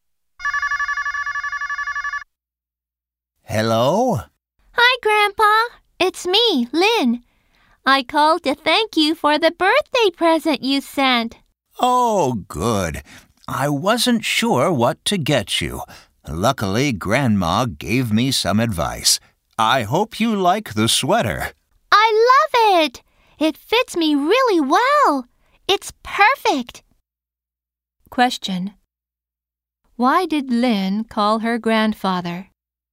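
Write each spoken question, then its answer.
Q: Why did Lynn call her grandfather?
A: To thank him for her birthday present.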